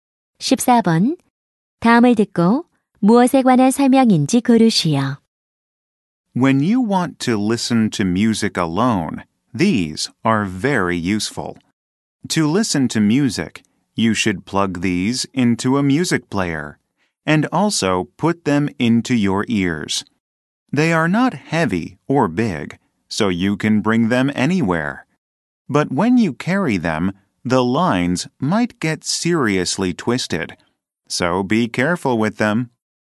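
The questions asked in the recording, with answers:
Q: 다음을 듣고 무엇에 관한 설명인지 고르시오.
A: 이어폰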